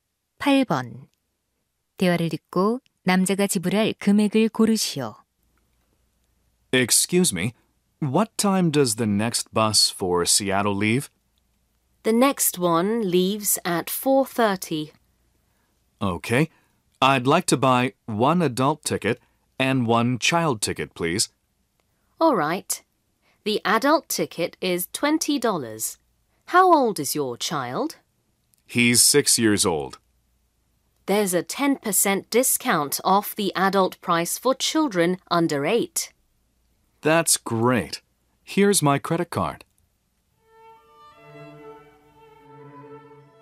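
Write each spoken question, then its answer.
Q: 대화를 듣고 남자가 지불할 금액을 고르시오.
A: $38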